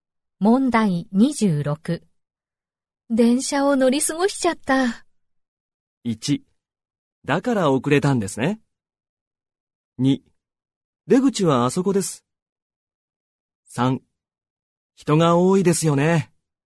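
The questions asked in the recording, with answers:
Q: 電車を乗り過ごしちゃった。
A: 1: だから遅れたんですね。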